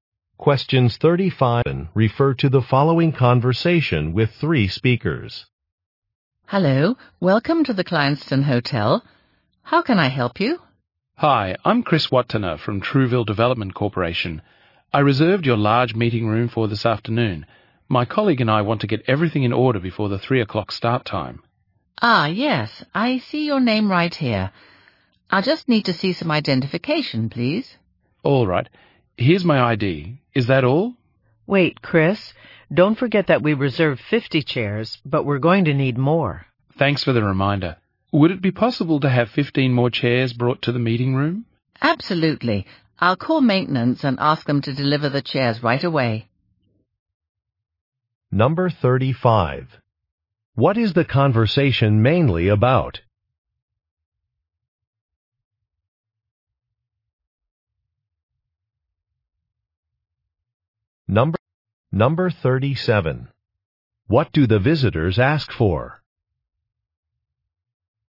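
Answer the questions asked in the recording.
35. A meeting room reservation at a hotel
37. More chairs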